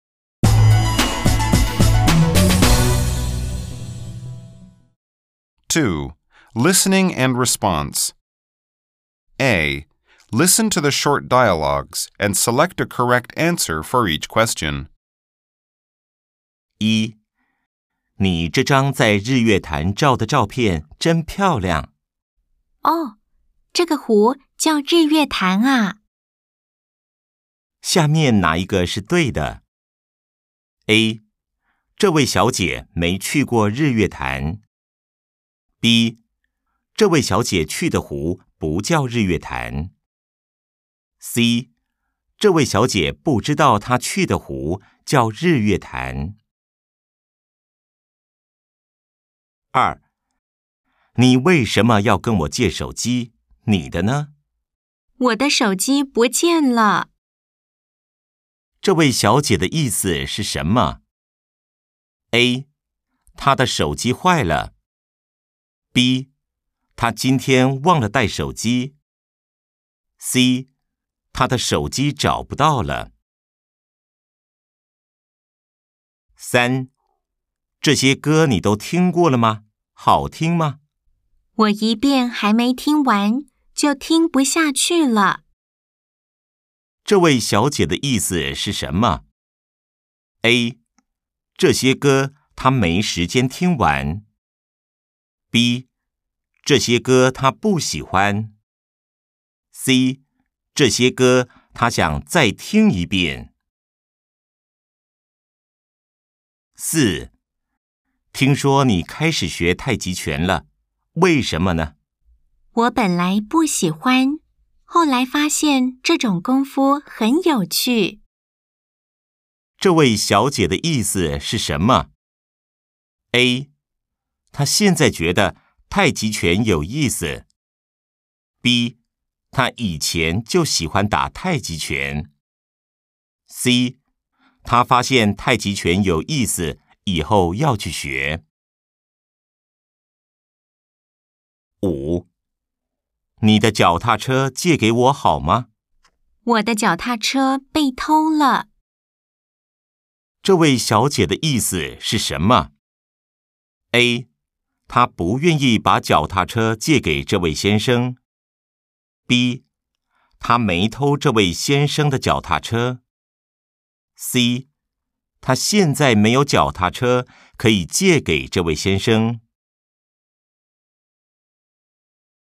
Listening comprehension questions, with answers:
下面哪一個是對的?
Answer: 這位小姐不知道她去的湖叫日月潭。